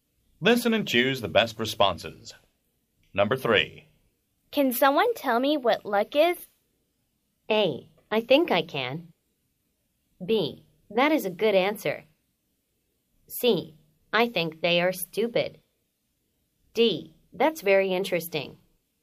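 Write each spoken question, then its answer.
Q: Can someone tell me what luck is?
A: A: I think I can.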